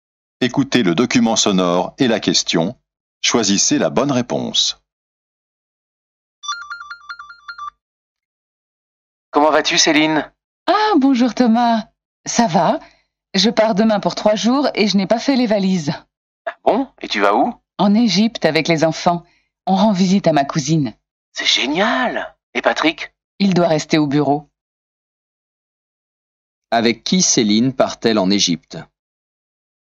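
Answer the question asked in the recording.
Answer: Avec ses enfants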